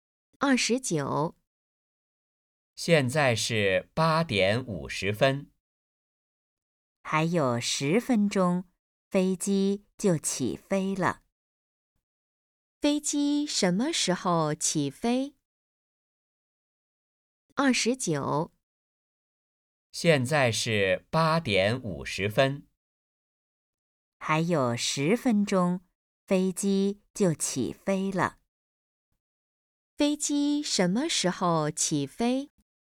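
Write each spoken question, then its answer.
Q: 飞机什么时候起飞?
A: 9:00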